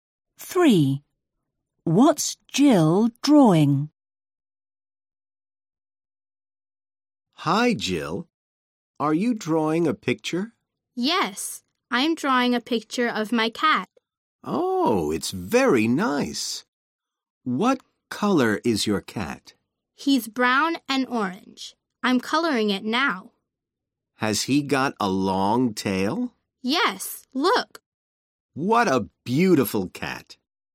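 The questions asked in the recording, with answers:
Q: What's Jill drawing?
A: Her cat (brown and orange, with a long tail)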